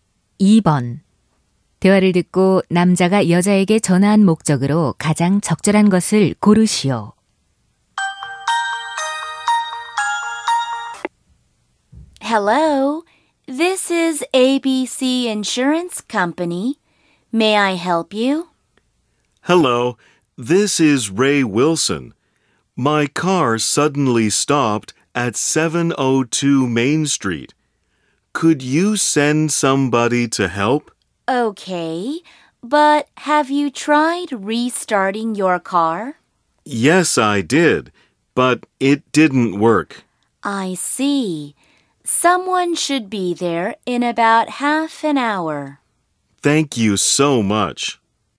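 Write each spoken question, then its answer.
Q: 대화를 듣고 남자가 여자에게 전화한 목적으로 가장 적절한 것을 고르시오.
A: 고장 난 차를 도와줄 사람을 보내 달라고 요청하려고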